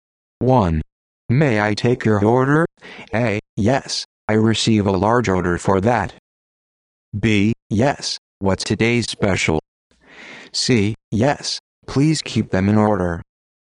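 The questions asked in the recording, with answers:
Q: May I take your order?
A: B: Yes, what's today's special?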